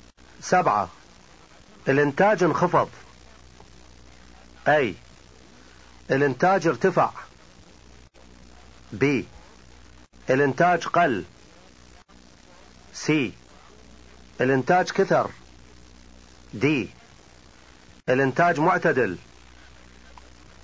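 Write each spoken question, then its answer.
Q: الانتاج انخفض.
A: B: الانتاج قل.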